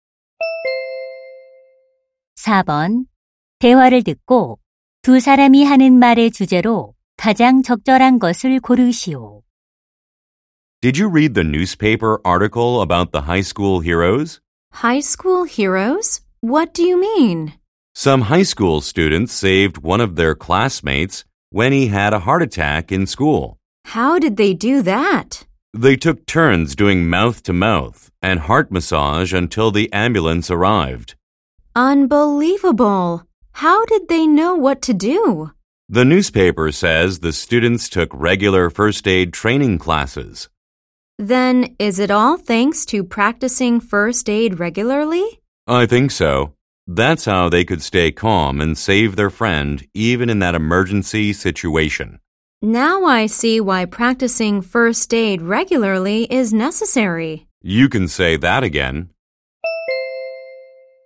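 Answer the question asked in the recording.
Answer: 정기적인 응급처치 훈련의 필요성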